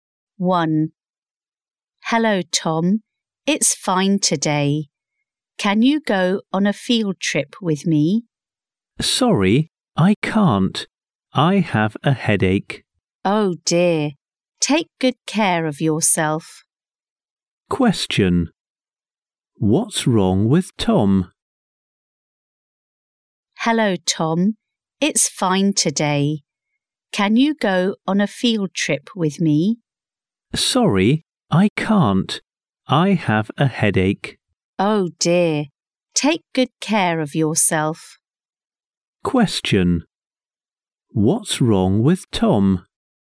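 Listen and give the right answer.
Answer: He has a headache.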